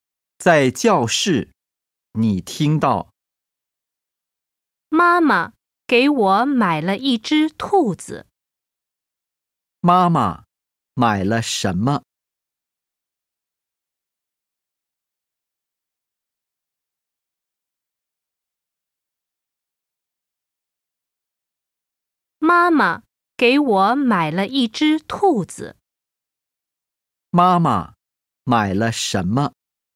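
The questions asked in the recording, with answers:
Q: 妈妈买了什么?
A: 一只兔子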